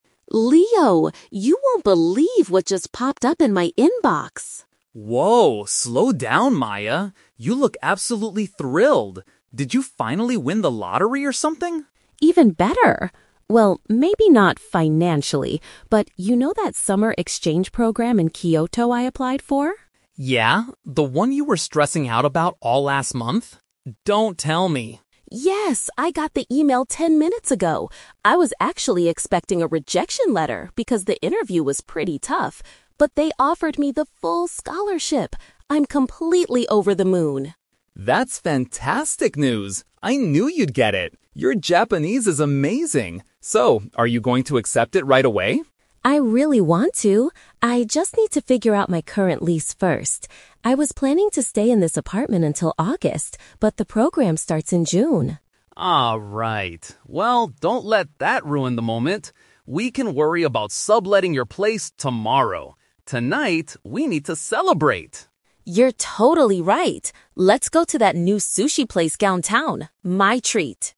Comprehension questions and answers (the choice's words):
Listen to the conversation between two friends and choose the correct answer (A, B, or C) for each question.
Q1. What is the main reason for Maya's excitement?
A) She won a large amount of money in the lottery.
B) She was accepted into a study program abroad.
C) She found a new apartment to rent in the city.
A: She was accepted into a study program abroad.

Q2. How did Maya feel about her interview before receiving the email?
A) She was confident she would get the scholarship.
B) She thought she had failed it.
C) She was annoyed by the difficult questions.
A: She thought she had failed it.

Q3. What is Maya's immediate problem regarding the trip?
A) She doesn't have enough money to pay for it.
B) She needs to deal with her current housing situation.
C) She needs to improve her Japanese before June.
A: She needs to deal with her current housing situation.

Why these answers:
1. Maya explicitly states she got a full scholarship for a "summer exchange program in Kyoto." This is a paraphrase of "accepted into a study program abroad." The Trap (A): Leo asks jokingly if she "won the lottery." Maya says no, so this is incorrect. The Trap (C): They mention her apartment, but it's about leaving her current lease, not finding a new place in her current city.
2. Maya says she was "expecting a rejection letter" because the interview was tough. This means she thought she had failed. The Trap (A): This is the exact opposite of how she felt. She was "stressing out" and expected rejection, not confident. The Trap (C): While the interview was "tough," she never mentioned feeling angry or annoyed by the questions—this is plausible but not mentioned.
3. Maya mentions she needs to "figure out my current lease" because she planned to stay until August, but the program starts in June. The Trap (A): The program is a "full scholarship," meaning it is paid for. She does not mention money problems. The Trap (C): Leo actually praises her language skills, saying "Your Japanese is amazing," so improving her Japanese is not her problem.

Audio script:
Maya: Leo! You won't believe what just popped up in my inbox!
Leo: Whoa, slow down, Maya. You look absolutely thrilled. Did you finally win the lottery or something?
Maya: Even better! Well, maybe not financially, but you know that summer exchange program in Kyoto I applied for?
Leo: Yeah, the one you were stressing out about all last month? Don't tell me...
Maya: Yes! I got the email ten minutes ago. I was actually expecting a rejection letter because the interview was pretty tough. But they offered me the full scholarship! I'm completely over the moon!
Leo: That's fantastic news! I knew you'd get it. Your Japanese is amazing. So, are you going to accept it right away?
Maya: I really want to. I just need to figure out my current lease first. I was planning to stay in this apartment until August, but the program starts in June.
Well, don't let that ruin the moment. We can worry about subletting your place tomorrow. Tonight, we need to celebrate!
Maya: You're totally right. Let's go to that new sushi place downtown. My treat!